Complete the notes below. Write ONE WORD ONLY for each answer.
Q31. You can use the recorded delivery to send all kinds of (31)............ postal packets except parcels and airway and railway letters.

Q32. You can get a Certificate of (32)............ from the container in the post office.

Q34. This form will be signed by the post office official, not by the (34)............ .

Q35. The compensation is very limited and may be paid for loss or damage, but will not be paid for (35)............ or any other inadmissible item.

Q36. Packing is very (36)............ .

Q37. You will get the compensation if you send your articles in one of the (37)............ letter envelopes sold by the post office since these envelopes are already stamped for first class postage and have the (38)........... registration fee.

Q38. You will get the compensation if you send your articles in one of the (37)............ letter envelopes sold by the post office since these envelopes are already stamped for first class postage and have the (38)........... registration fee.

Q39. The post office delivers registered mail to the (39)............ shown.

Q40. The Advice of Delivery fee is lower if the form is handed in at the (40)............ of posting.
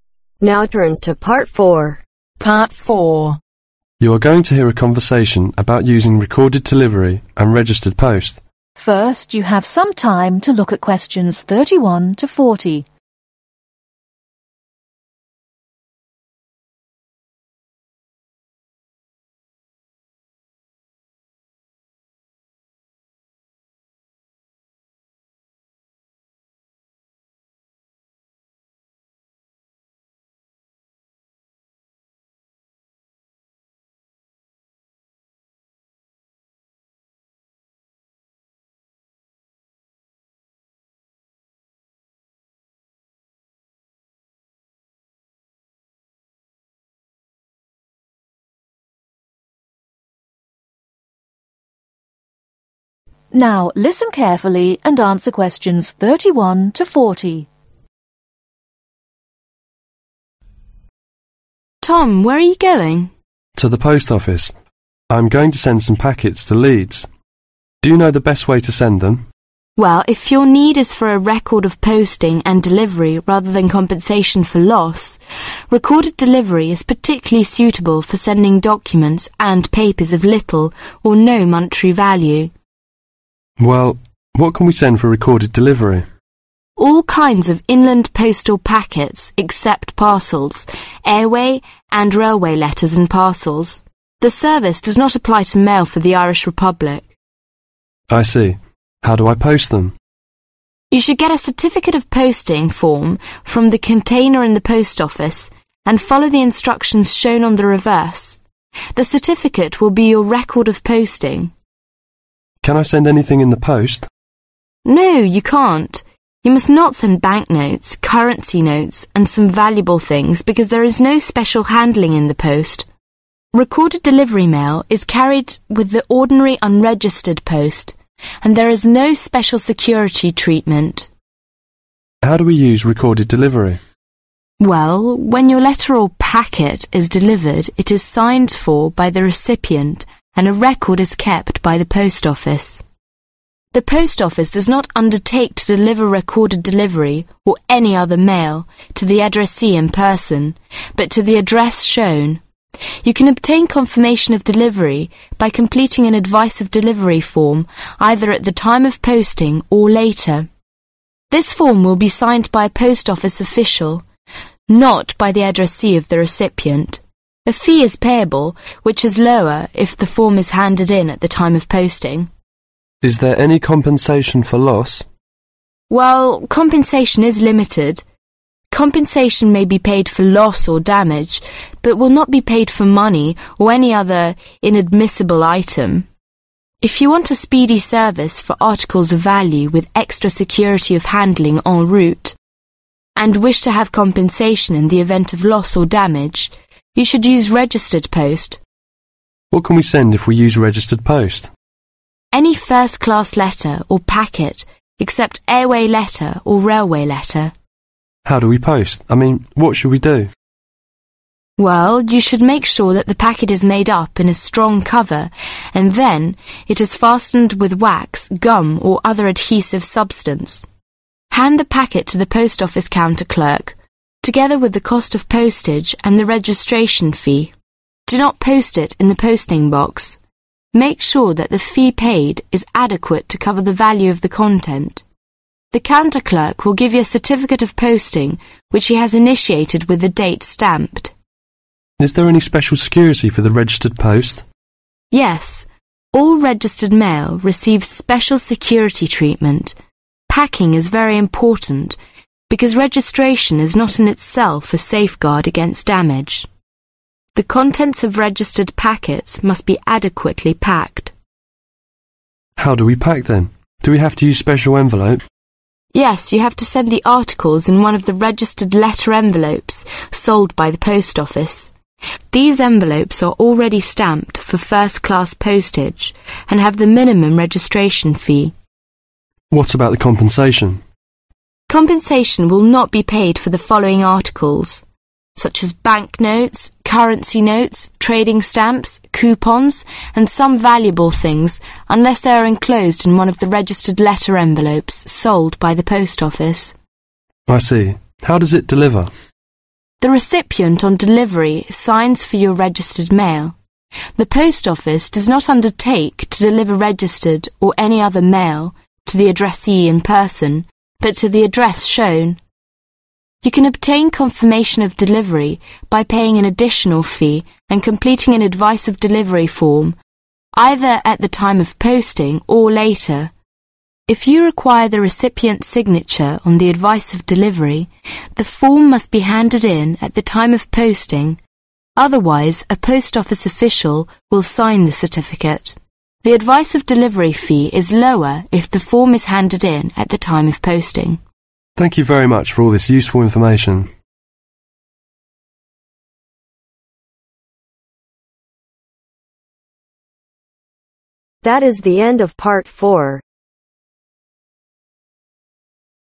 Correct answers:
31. Inland
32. Posting
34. Recipient
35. Money
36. Important
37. Registered
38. Minimum
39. Address
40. Time